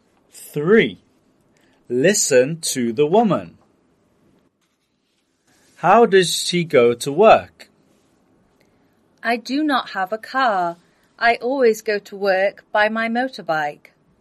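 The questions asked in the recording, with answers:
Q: How does she go to work?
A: By motorbike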